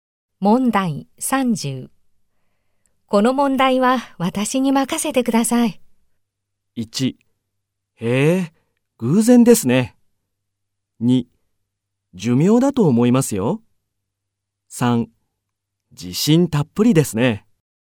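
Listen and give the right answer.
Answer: 3: 自信たっぷりですね。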